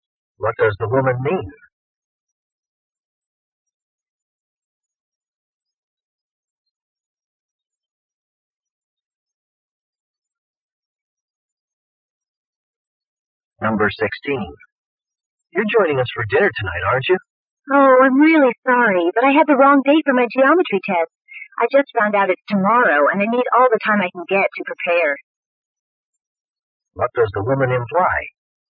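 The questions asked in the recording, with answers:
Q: What does the woman imply?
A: She can't come to dinner because she has to study for her test tomorrow.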